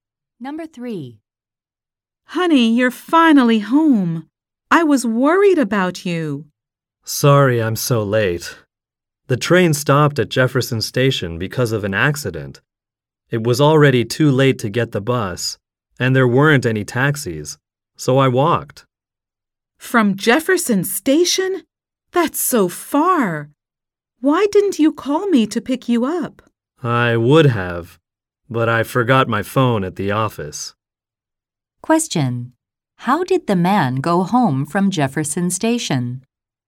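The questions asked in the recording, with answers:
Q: How did the man go home from Jefferson Station?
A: He walked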